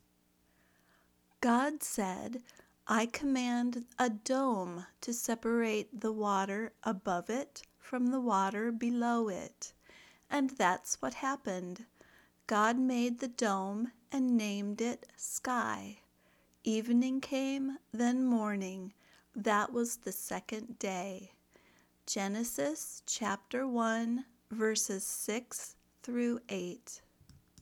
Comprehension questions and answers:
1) What was above and below the dome that God created?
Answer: Water was above and below the dome.

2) What did God call the dome?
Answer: God called the dome "sky."

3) What came after the evening?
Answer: Morning came after the evening.

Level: Beginner